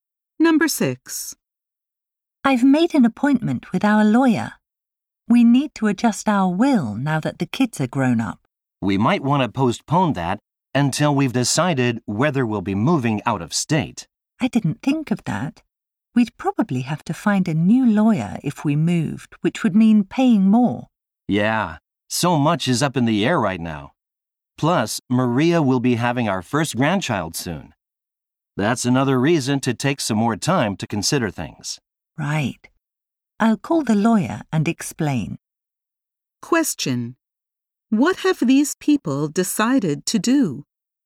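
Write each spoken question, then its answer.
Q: What have these people decided to do?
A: Put off changing their will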